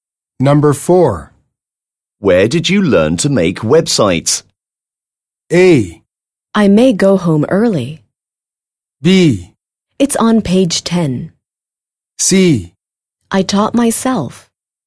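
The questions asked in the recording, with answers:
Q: Where did you learn to make websites?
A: C: I taught myself.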